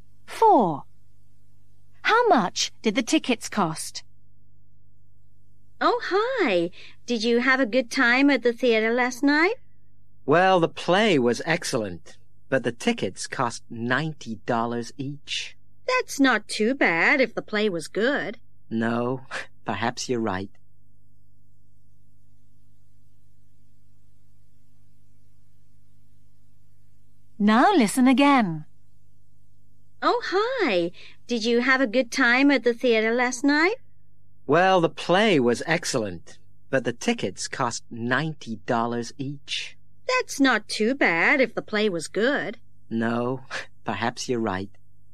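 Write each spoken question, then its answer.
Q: How much did the tickets cost?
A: $90 each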